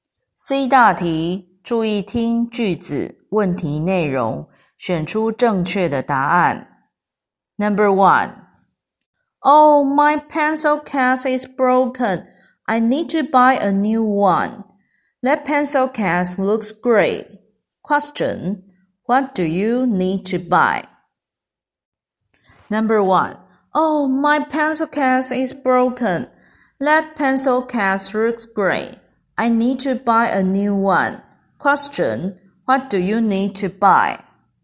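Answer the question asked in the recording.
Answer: A new pencil case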